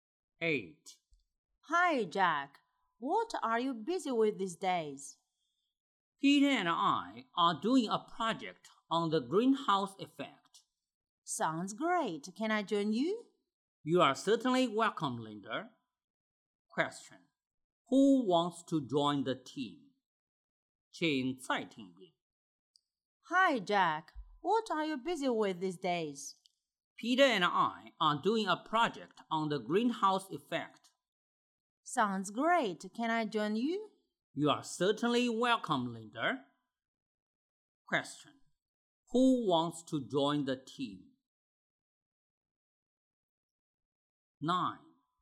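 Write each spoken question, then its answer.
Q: Who wants to join the team?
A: Linda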